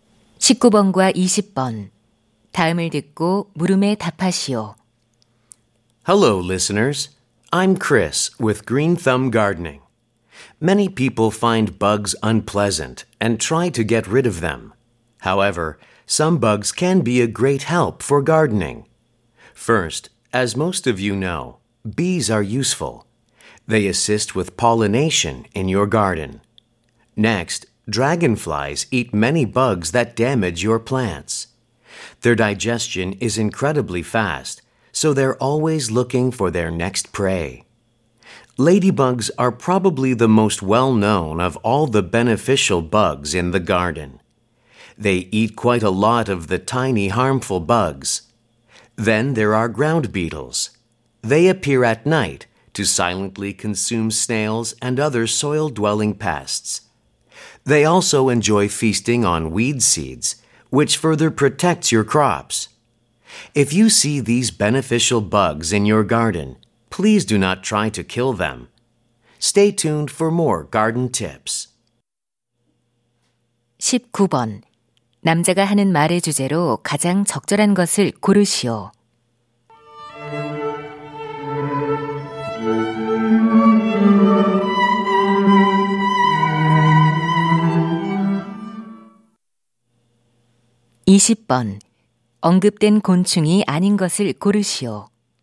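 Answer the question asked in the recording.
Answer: 정원 가꾸기에 도움이 되는 곤충들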